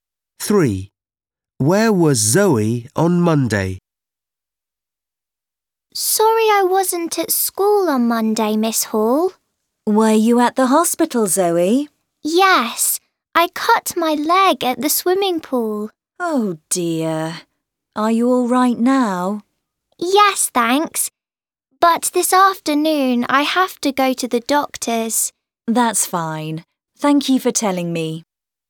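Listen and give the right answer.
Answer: At the hospital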